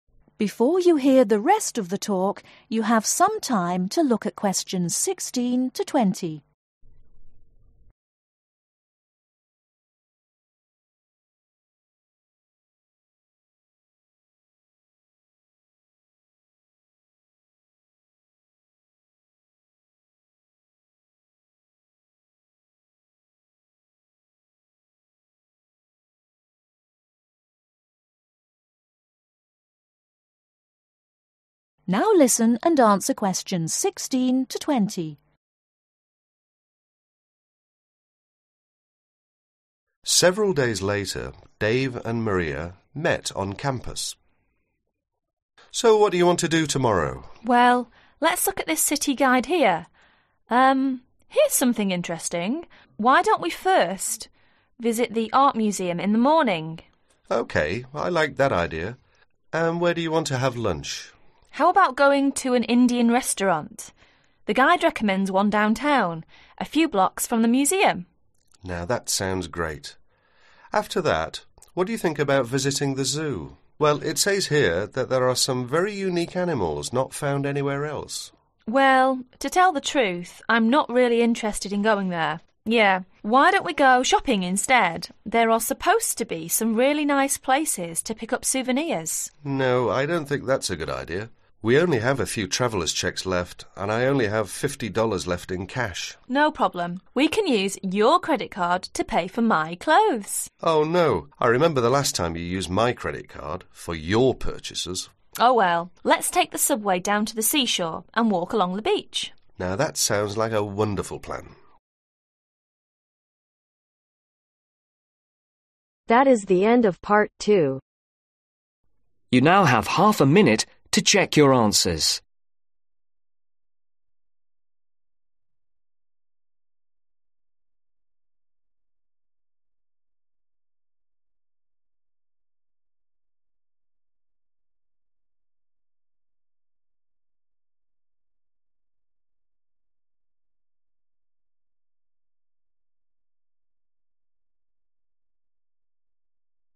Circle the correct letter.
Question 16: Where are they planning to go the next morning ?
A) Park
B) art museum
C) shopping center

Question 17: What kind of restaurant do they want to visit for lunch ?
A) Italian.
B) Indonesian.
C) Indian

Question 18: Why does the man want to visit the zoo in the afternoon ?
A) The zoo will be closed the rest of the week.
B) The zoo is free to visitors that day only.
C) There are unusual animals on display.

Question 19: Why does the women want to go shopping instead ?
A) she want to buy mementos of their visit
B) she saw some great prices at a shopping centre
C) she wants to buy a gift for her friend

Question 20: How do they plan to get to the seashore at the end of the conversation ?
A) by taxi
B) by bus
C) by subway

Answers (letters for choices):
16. B
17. C
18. C
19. A
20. C